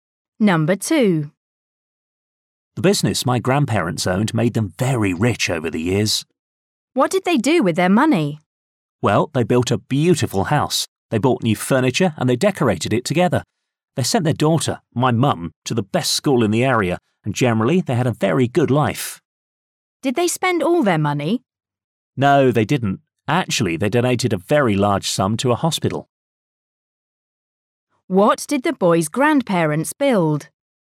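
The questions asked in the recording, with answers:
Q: What did the boy's grandparents build?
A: A beautiful house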